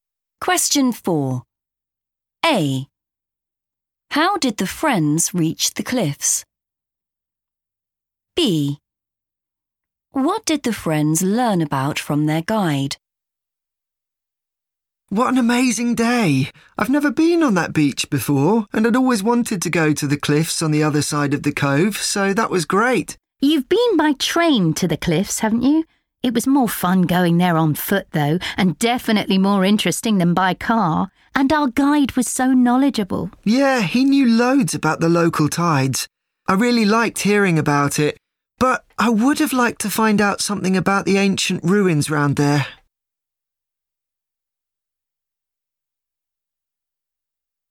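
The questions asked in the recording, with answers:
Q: How did the friends reach the cliffs?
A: on foot

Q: What did the friends learn about from their guide?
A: the local tides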